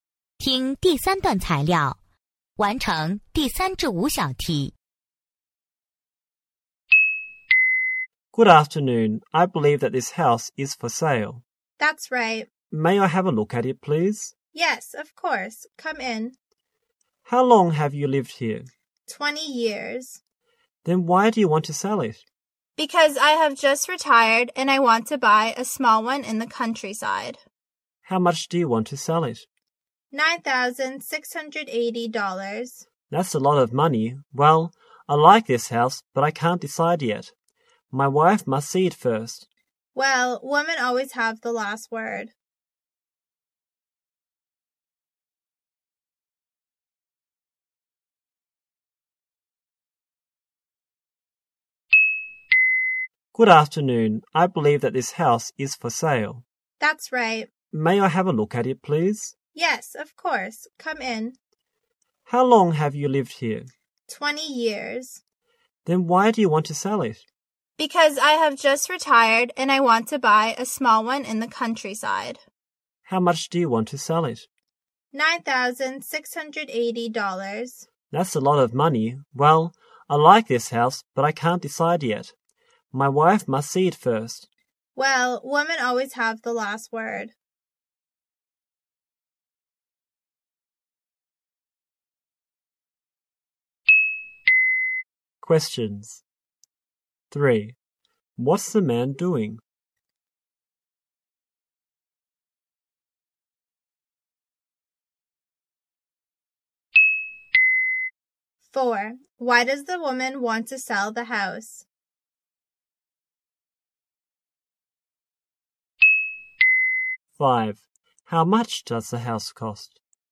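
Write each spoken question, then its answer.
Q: What's the man doing?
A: Looking at a house to buy.

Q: Why does the woman want to sell the house?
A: She has just retired and wants to buy a small house in the countryside.

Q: How much does the house cost?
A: $9,680.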